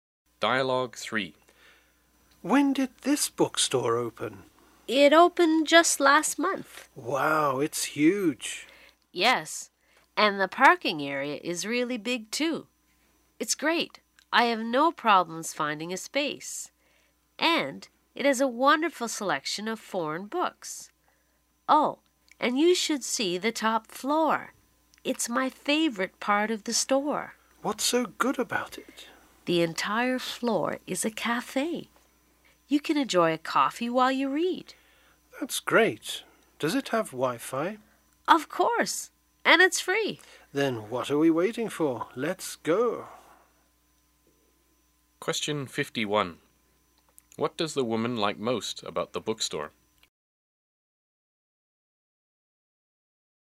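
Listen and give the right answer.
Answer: The top floor, which is a cafe.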